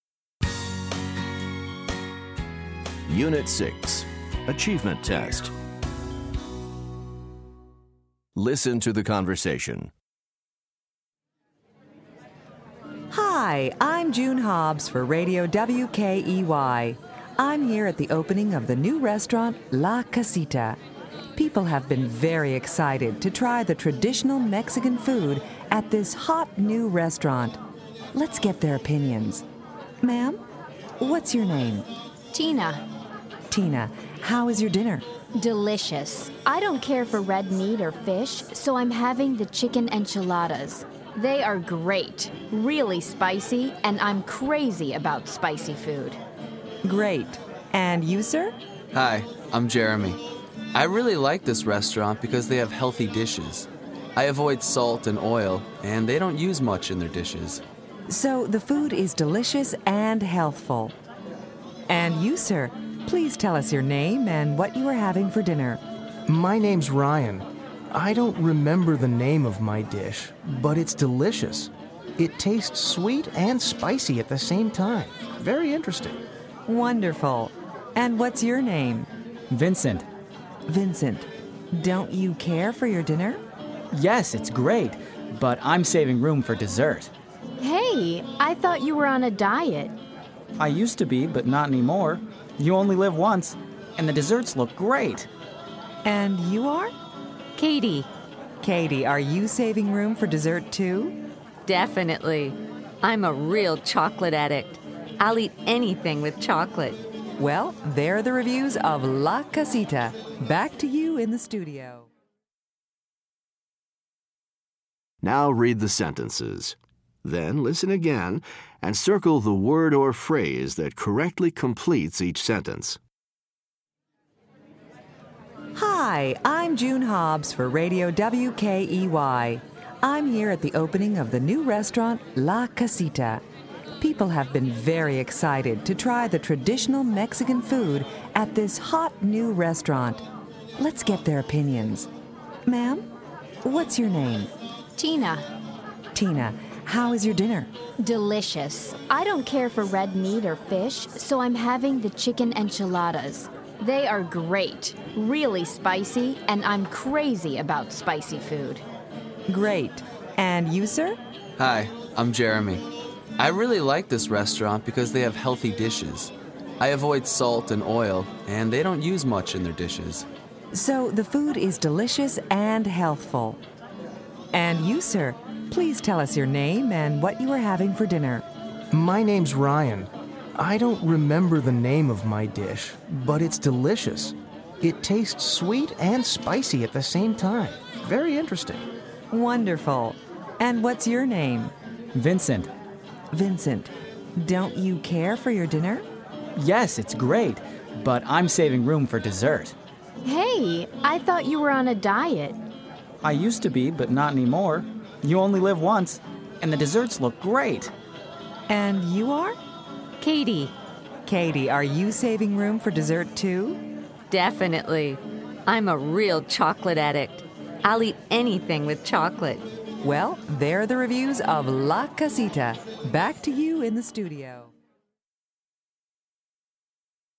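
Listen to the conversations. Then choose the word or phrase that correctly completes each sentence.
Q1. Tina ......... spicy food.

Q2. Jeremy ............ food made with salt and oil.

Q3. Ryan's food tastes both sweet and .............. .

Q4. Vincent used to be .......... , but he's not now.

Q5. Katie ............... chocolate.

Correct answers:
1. is crazy about
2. avoids
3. spicy
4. on a diet
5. is addicted to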